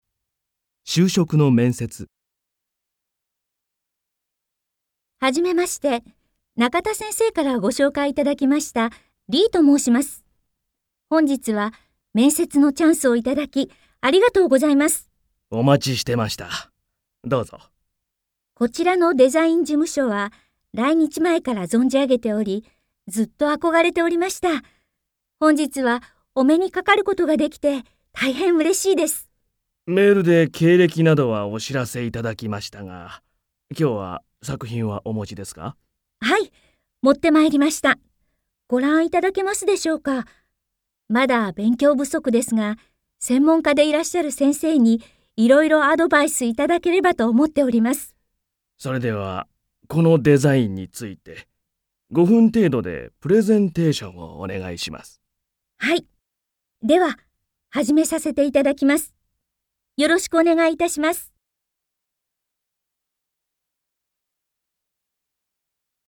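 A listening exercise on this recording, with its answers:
Listen and answer the question.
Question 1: リーさんは何を持ってきましたか。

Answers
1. 作品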